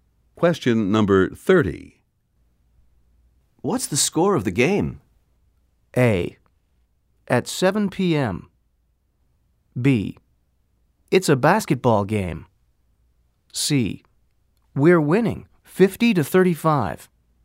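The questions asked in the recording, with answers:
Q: What's the score of the game?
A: C: We're winning 50-35.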